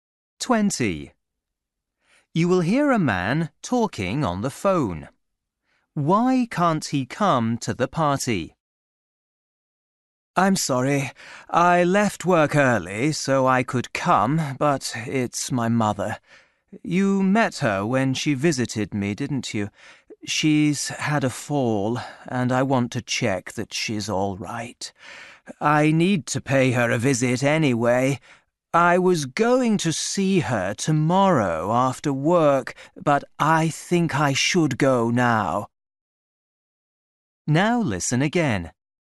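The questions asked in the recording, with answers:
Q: Why can't he come to the party?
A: His mother has had a fall and he wants to check on her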